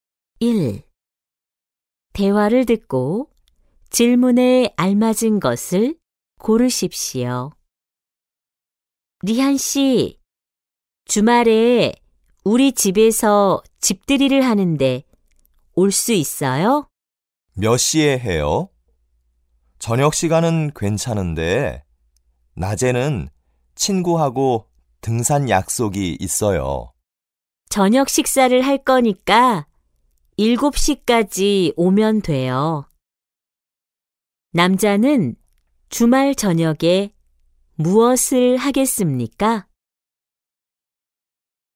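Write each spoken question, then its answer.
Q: 남자는 주말 저녁에 무엇을 하겠습니까?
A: 여자의 집들이에 갑니다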